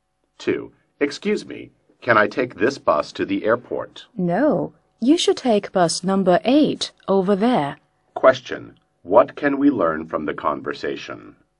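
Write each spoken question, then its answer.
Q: What can we learn from the conversation?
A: The man should take bus number 8 to the airport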